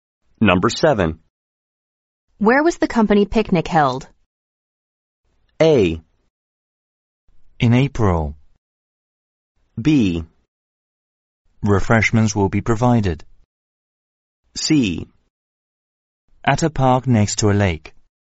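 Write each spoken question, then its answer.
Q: Where was the company picnic held?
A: C: At a park next to a lake.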